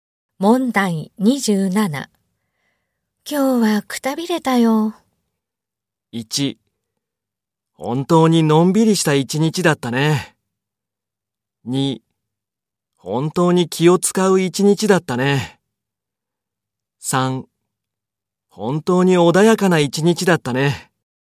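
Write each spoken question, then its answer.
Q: 今日はくたびれたよ。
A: 2: 本当に気を使う一日だったね。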